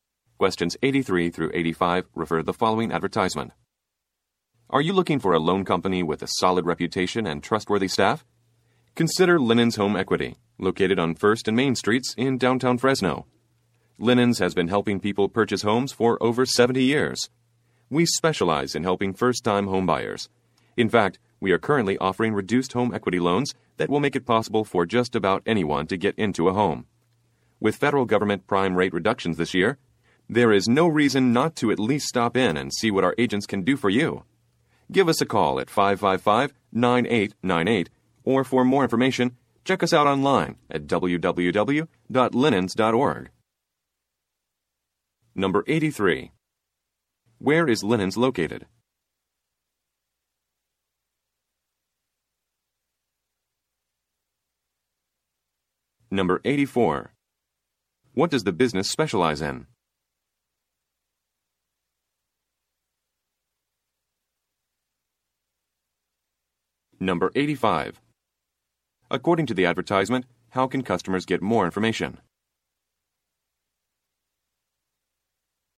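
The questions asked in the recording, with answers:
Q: Where is Linens located?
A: On 1st and Main Streets in downtown Fresno

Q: What does the business specialize in?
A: Helping first-time homebuyers

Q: According to the advertisement, how can customers get more information?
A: Online at www.linens.org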